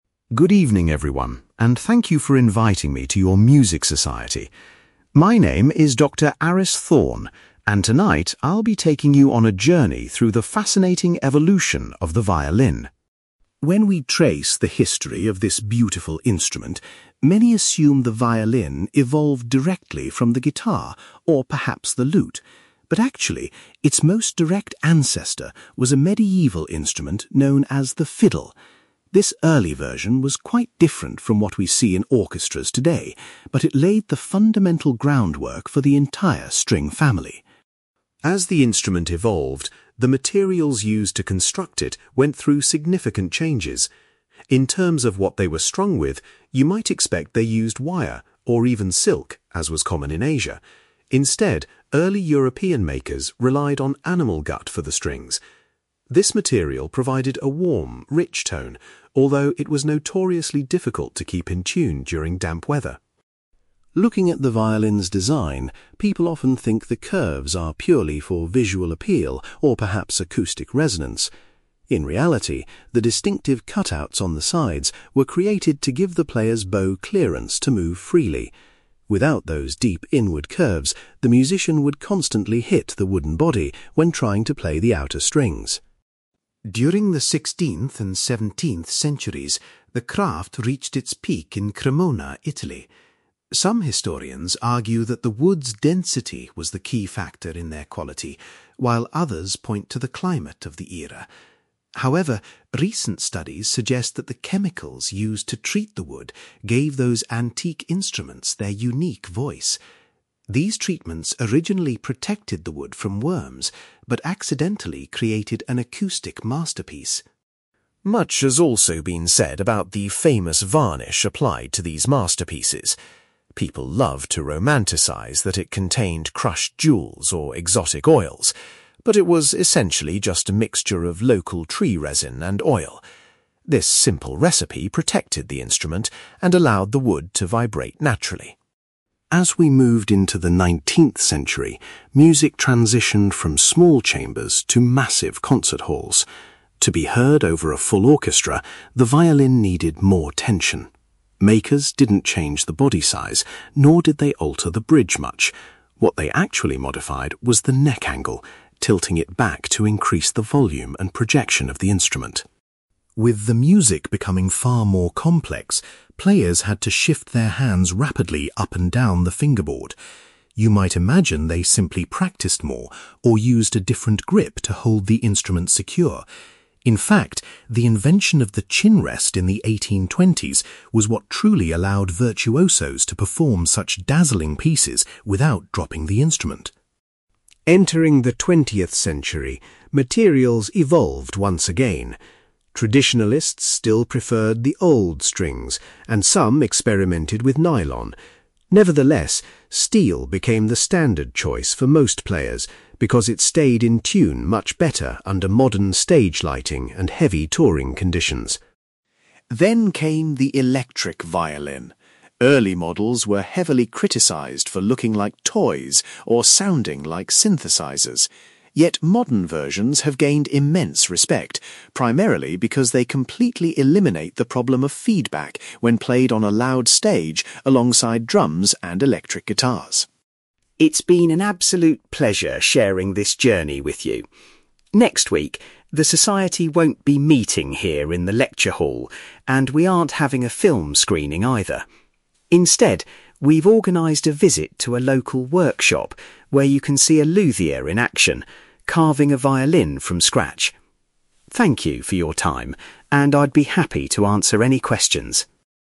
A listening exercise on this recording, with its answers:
You will hear a music historian called Dr. Aris Thorne giving a guest lecture to a music society about the history of the violin. For questions 9-18, complete the sentences with a word or short phrase.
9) Dr Thorne points out that a medieval instrument called the (9)........................... is the true ancestor of the violin.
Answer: fiddle

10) Early European violin makers used (10)........................... to make their strings.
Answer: animal gut

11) The unusual shape of the violin's sides was designed to provide space for the (11)........................... .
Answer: bow

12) Recent research indicates that the (12)........................... applied to the wood created the unique sound of classical violins.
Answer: chemicals

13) The famous coating on the outside of classical violins consisted merely of oil and (13)........................... .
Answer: tree resin

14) Makers increased the volume of the violin in the nineteenth century by altering its (14)........................... .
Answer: neck angle

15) Musicians were able to play highly complex music safely thanks to the invention of the (15)........................... .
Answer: chin rest

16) In the twentieth century, strings made of (16)........................... became popular because they rarely went out of tune.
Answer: steel

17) Electric violins are useful for loud concerts because they avoid the issue of (17)........................... .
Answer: feedback

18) For their next event, the music society will visit a (18)........................... to watch an instrument being made.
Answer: local workshop

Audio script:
Dr. Aris Thorne: Good evening, everyone, and thank you for inviting me to your music society. My name is Dr. Aris Thorne, and tonight I'll be taking you on a journey through the fascinating evolution of the violin.
When we trace the history of this beautiful instrument, many assume the violin evolved directly from the guitar, or perhaps the lute. But actually, its most direct ancestor was a medieval instrument known as the fiddle. This early version was quite different from what we see in orchestras today, but it laid the fundamental groundwork for the entire string family.
As the instrument evolved, the materials used to construct it went through significant changes. In terms of what they were strung with, you might expect they used wire, or even silk, as was common in Asia. Instead, early European makers relied on animal gut for the strings. This material provided a warm, rich tone, although it was notoriously difficult to keep in tune during damp weather.
Looking at the violin's design, people often think the curves are purely for visual appeal or perhaps acoustic resonance. In reality, the distinctive cut-outs on the sides were created to give the player's bow clearance to move freely. Without those deep inward curves, the musician would constantly hit the wooden body when trying to play the outer strings.
During the sixteenth and seventeenth centuries, the craft reached its peak in Cremona, Italy. Some historians argue that the wood's density was the key factor in their quality, while others point to the climate of the era. However, recent studies suggest that the chemicals used to treat the wood gave those antique instruments their unique voice. These treatments originally protected the wood from worms, but accidentally created an acoustic masterpiece.
Much has also been said about the famous varnish applied to these masterpieces. People love to romanticise that it contained crushed jewels or exotic oils. But it was essentially just a mixture of local tree resin and oil. This simple recipe protected the instrument and allowed the wood to vibrate naturally.
As we moved into the nineteenth century, music transitioned from small chambers to massive concert halls. To be heard over a full orchestra, the violin needed more tension. Makers didn't change the body size, nor did they alter the bridge much. What they actually modified was the neck angle, tilting it back to increase the volume and projection of the instrument.
With the music becoming far more complex, players had to shift their hands rapidly up and down the fingerboard. You might imagine they simply practised more, or used a different grip to hold the instrument secure. In fact, the invention of the chin rest in the 1820s was what truly allowed virtuosos to perform such dazzling pieces without dropping the instrument.
Entering the twentieth century, materials evolved once again. Traditionalists still preferred the old strings, and some experimented with nylon. Nevertheless, steel became the standard choice for most players because it stayed in tune much better under modern stage lighting and heavy touring conditions.
Then came the electric violin. Early models were heavily criticised for looking like toys, or sounding like synthesizers. Yet, modern versions have gained immense respect, primarily because they completely eliminate the problem of feedback when played on a loud stage alongside drums and electric guitars.
It's been an absolute pleasure sharing this journey with you. Next week, the society won't be meeting here in the lecture hall, and we aren't having a film screening either. Instead, we've organised a visit to a local workshop where you can see a luthier in action, carving a violin from scratch. Thank you for your time, and I'd be happy to answer any questions.

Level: B2